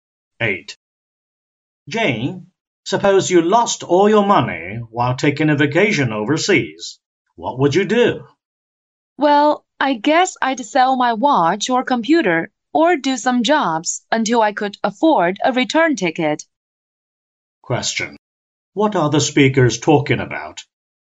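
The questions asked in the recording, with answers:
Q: What are the speakers talking about?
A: What to do if you lost all your money while traveling abroad.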